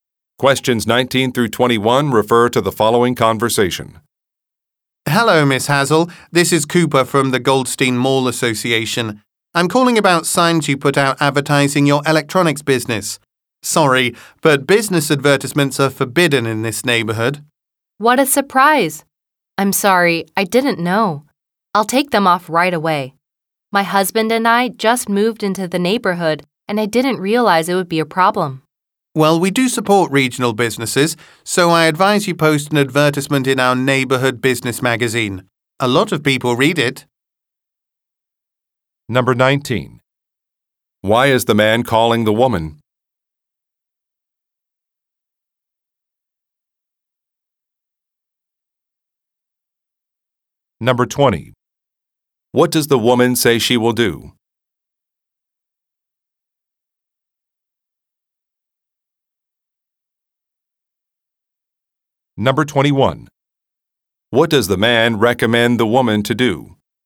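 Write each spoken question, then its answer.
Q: Why is the man calling the woman?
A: About her business advertising signs, which are forbidden

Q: What does the woman say she will do?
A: Take the signs down right away

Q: What does the man recommend the woman to do?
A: Advertise in the neighborhood business magazine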